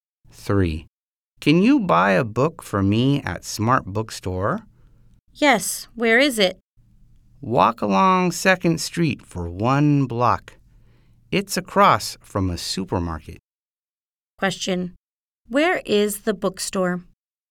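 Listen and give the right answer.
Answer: On 2nd Street, across from a supermarket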